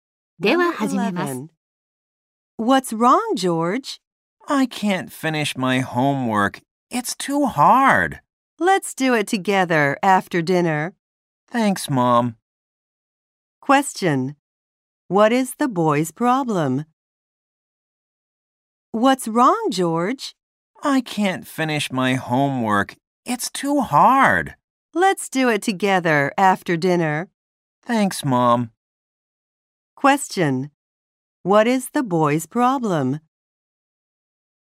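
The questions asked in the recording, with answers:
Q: What is the boy's problem?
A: He can't finish his homework because it's too hard.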